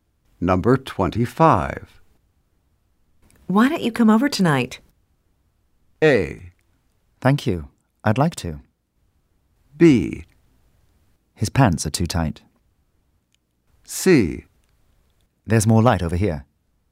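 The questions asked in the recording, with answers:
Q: Why don't you come over tonight?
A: A: Thank you. I'd like to.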